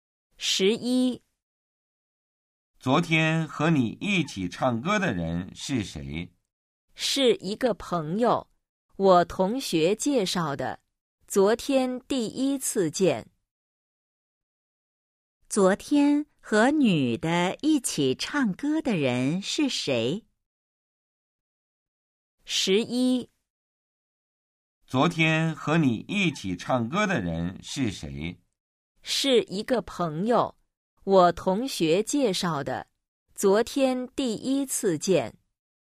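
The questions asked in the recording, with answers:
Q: 昨天和女的一起唱歌的人是谁?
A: 同学介绍的一个朋友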